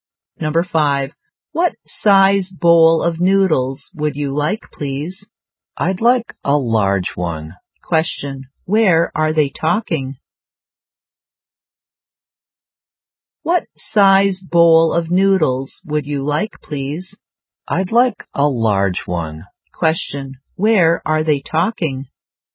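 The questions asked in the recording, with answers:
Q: Question. Where are they talking?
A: In a noodle restaurant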